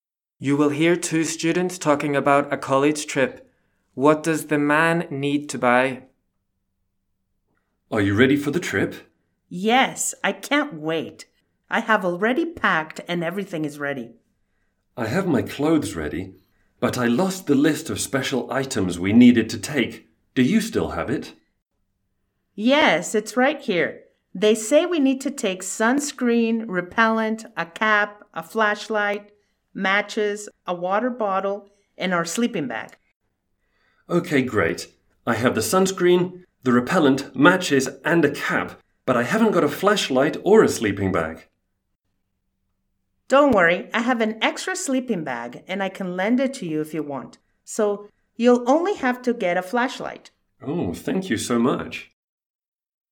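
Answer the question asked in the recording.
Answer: A flashlight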